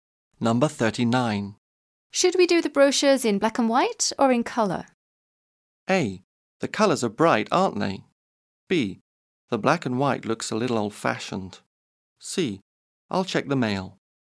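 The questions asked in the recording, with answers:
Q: Should we do the brochures in black and white or in colour?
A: B: The black and white looks a little old-fashioned.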